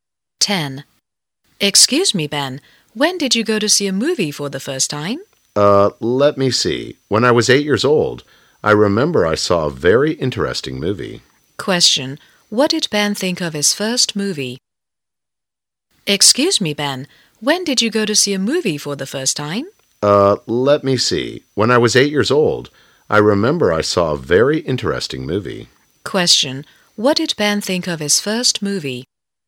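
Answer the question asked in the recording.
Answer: It was very interesting.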